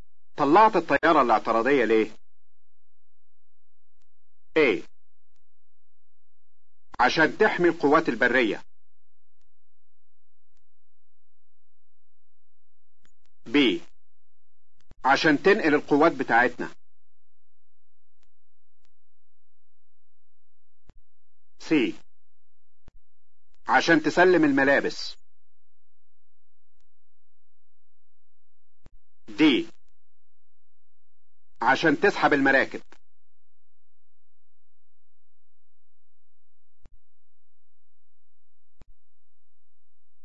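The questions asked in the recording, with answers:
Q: طلعت الطيارة الاعتراضية ليه؟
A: A: عشان تحمي القوات البرية.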